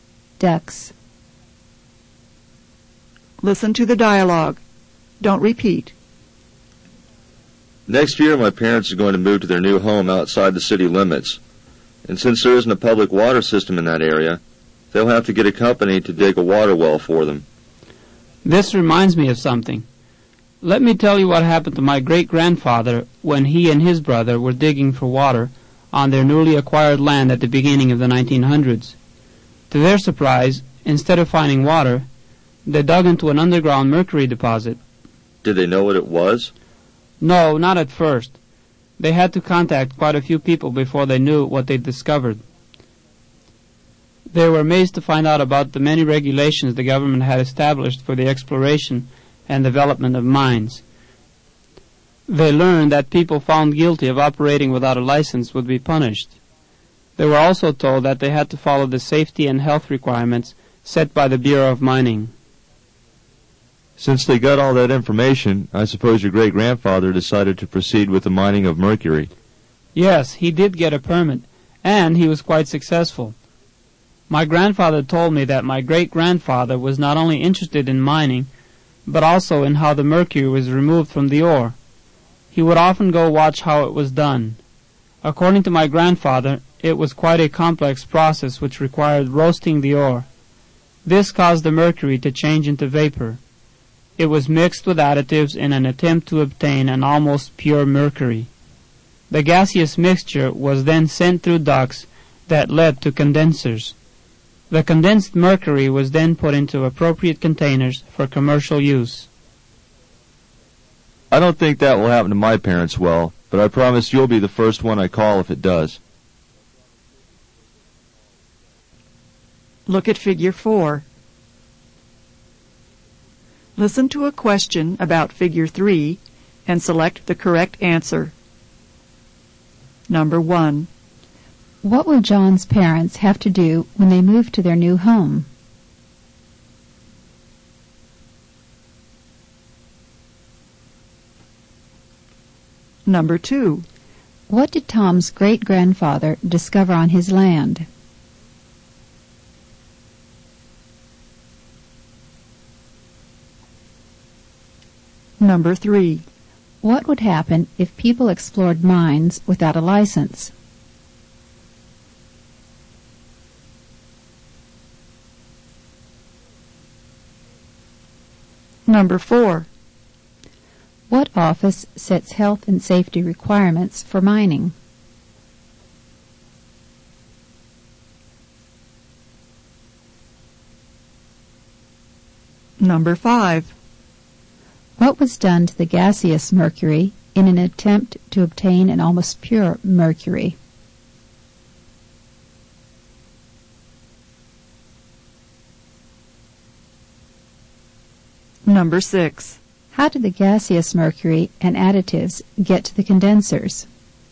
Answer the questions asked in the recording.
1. John's parents will have to get a company to dig a water well.
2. Tom's great-grandfather discovered an underground mercury deposit.
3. People would be punished if they explored mines without a license.
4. The Bureau of Mining sets health and safety requirements for mining.
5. The gaseous mercury was mixed with additives in an attempt to obtain an almost pure mercury.
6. The gaseous mercury and additives were sent to the condensers through ducts.